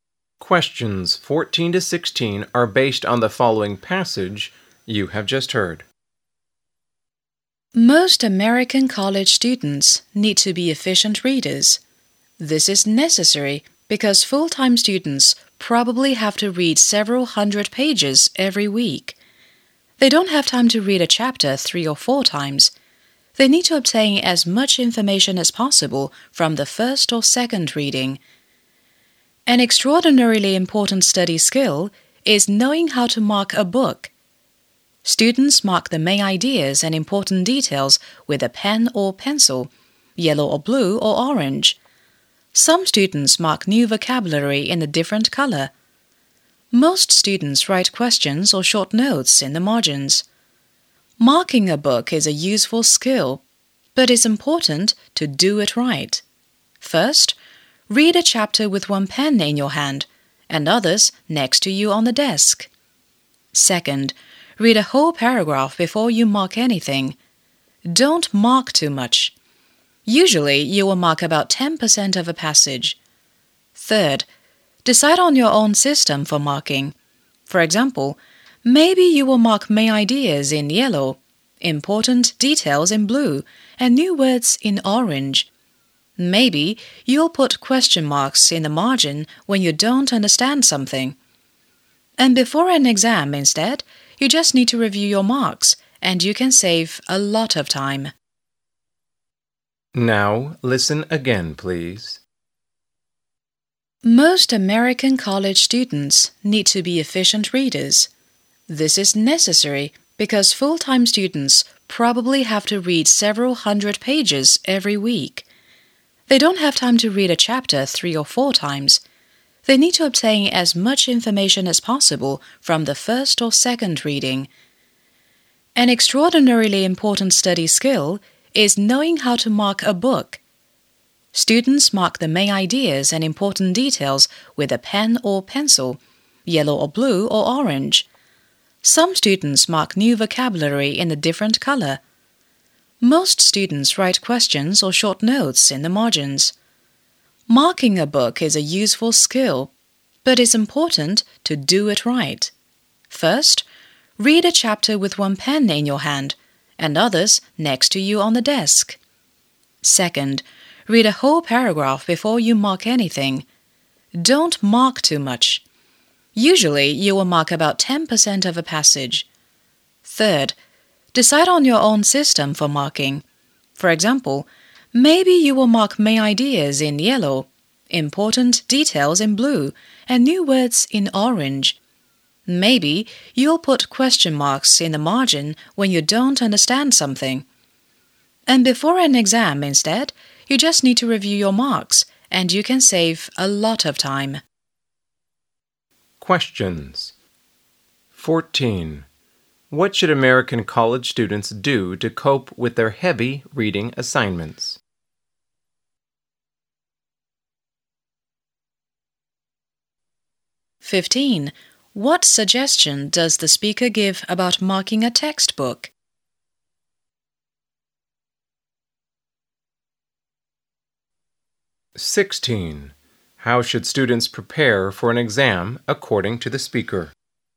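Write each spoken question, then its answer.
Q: What should American college students do to cope with their heavy reading assignments?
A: Read efficiently and mark their books

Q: How should students prepare for an exam according to the speaker?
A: By reviewing their marks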